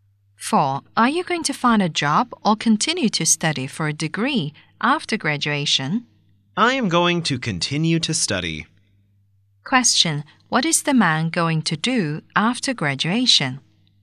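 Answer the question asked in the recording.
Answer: Continue to study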